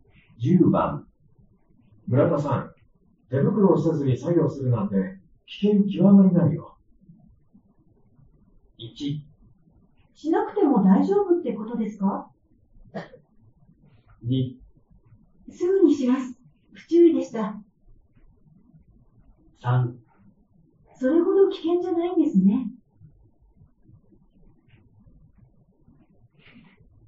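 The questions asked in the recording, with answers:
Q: 村田さん、手袋をせずに作業するなんて危険極まりないよ。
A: 2: すぐにします、不注意でした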